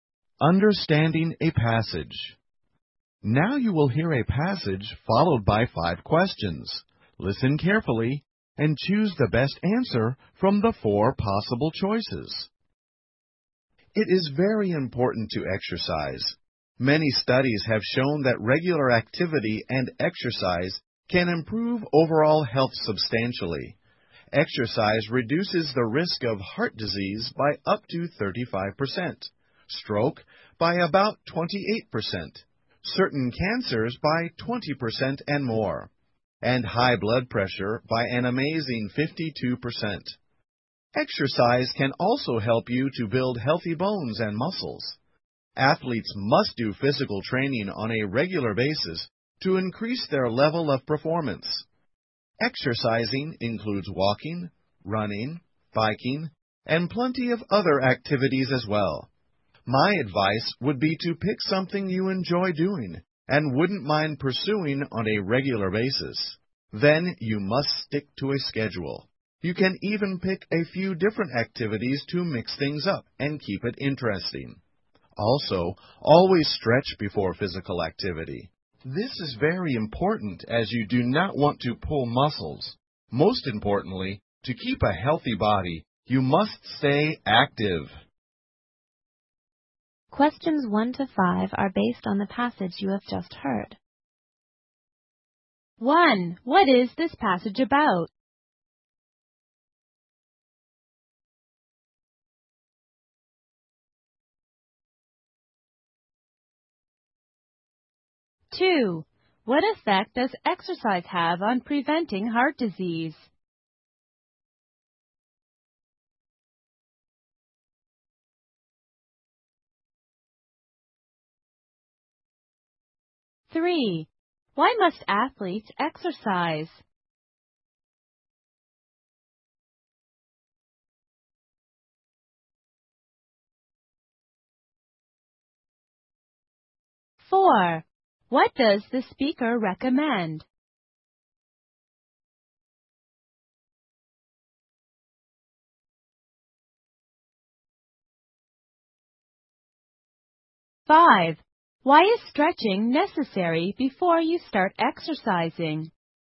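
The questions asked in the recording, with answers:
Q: What is this passage about?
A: The importance of exercise.

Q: What effect does exercise have on preventing heart disease?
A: It reduces the risk by up to 35%.

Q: Why must athletes exercise?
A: To increase their level of performance.

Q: What does the speaker recommend?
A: Pick an activity you enjoy and stick to a schedule.

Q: Why is stretching necessary before you start exercising?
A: To avoid pulling muscles.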